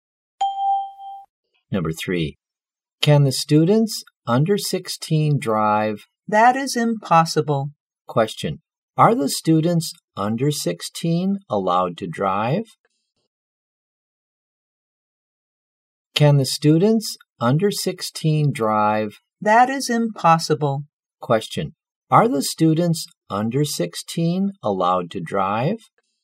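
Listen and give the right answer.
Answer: No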